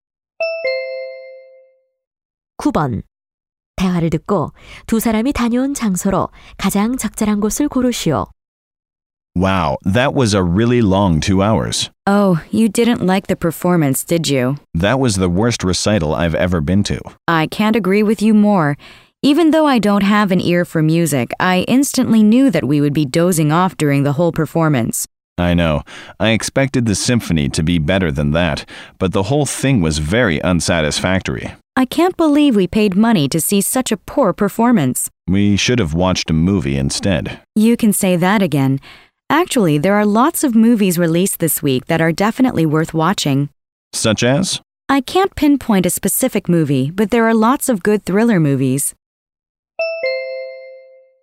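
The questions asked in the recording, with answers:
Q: 대화를 듣고 두 사람이 다녀온 장소로 가장 적절한 곳을 고르시오.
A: 음악회장(교향악 연주회)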